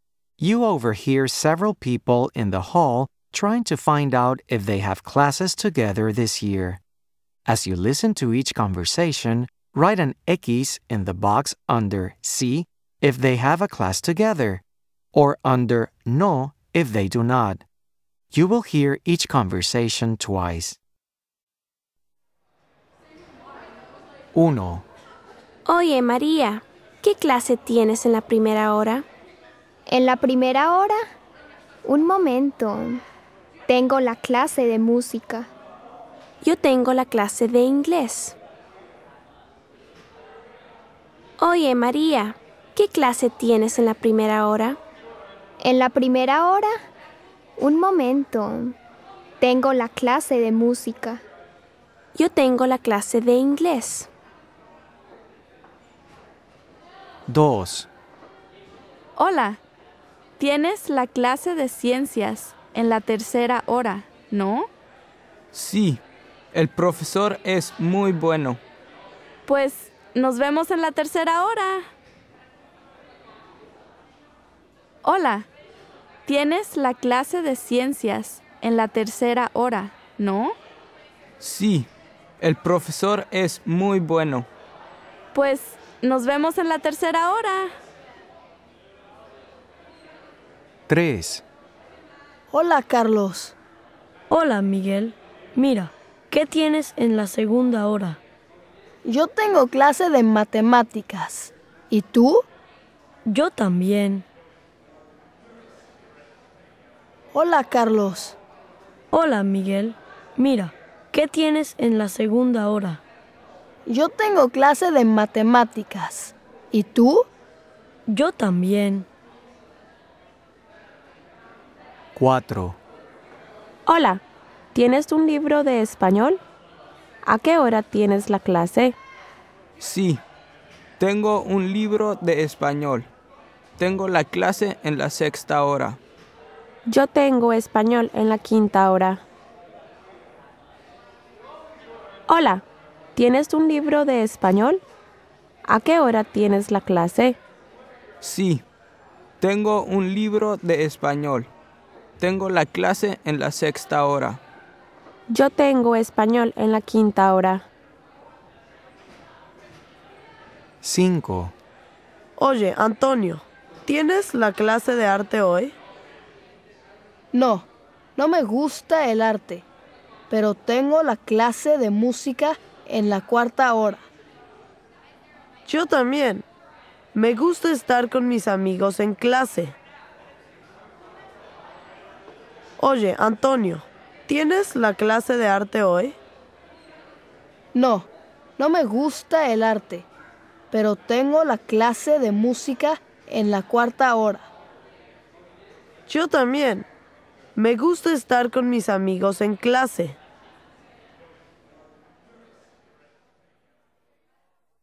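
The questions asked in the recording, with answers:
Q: As you listen to each conversation, write an X in the box under Sí if they have a class together, or under No if they do not.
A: No

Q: As you listen to each conversation, write an X in the box under Sí if they have a class together, or under No if they do not.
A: Sí

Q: As you listen to each conversation, write an X in the box under Sí if they have a class together, or under No if they do not.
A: Sí

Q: As you listen to each conversation, write an X in the box under Sí if they have a class together, or under No if they do not.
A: No

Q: As you listen to each conversation, write an X in the box under Sí if they have a class together, or under No if they do not.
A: Sí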